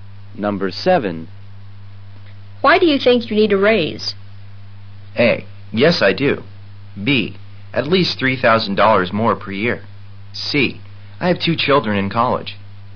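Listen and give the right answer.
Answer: C: I have two children in college.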